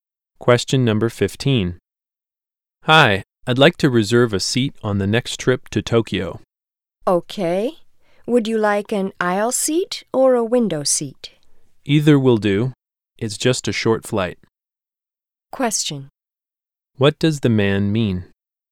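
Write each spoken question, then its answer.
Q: What does the man mean?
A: Either seat is fine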